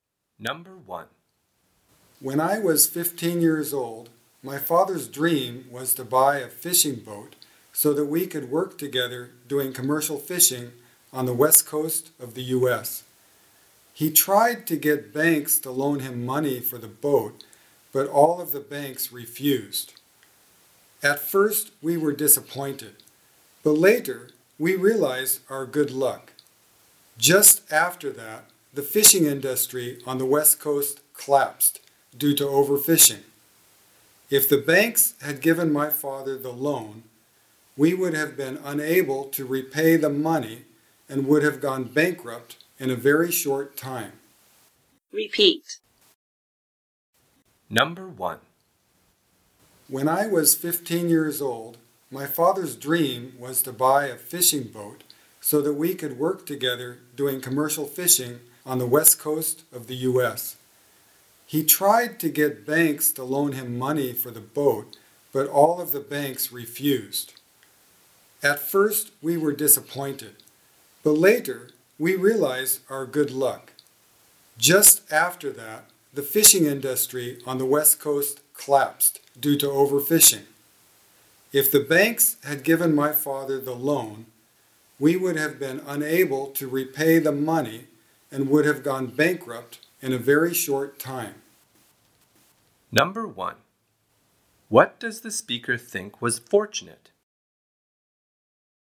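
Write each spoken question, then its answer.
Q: What does the speaker think was fortunate?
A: That the banks refused to lend his father money for the boat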